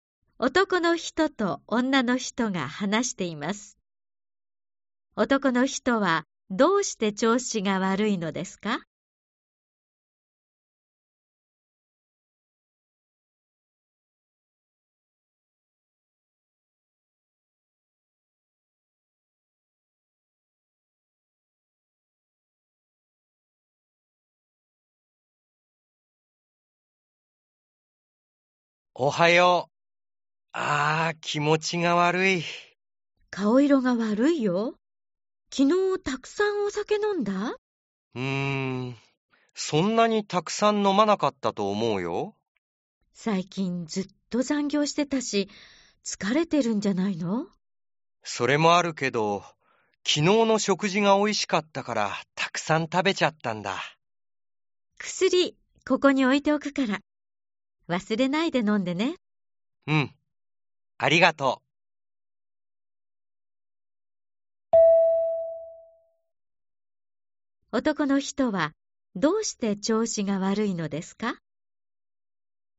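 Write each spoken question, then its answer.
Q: 男の人はどうして調子が悪いのですか?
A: 昨日の食事が美味しくて、たくさん食べたから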